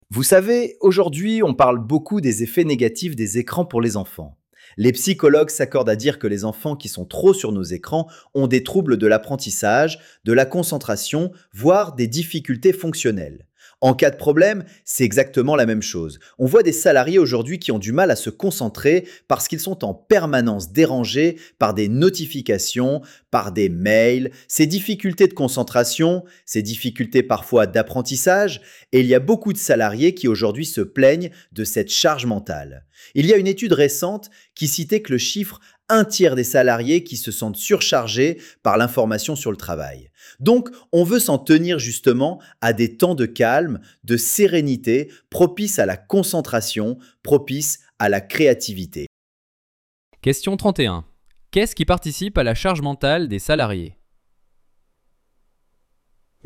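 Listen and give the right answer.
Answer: Les dérangements permanents par les notifications et les mails.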